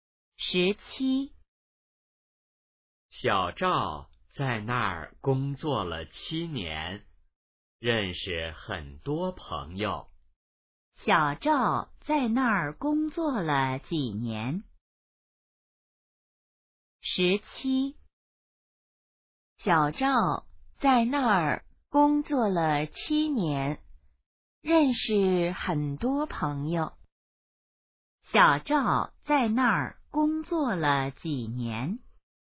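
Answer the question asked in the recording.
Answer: 七年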